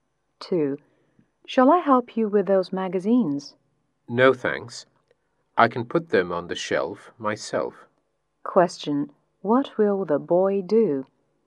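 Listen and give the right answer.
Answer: Put the magazines on the shelf himself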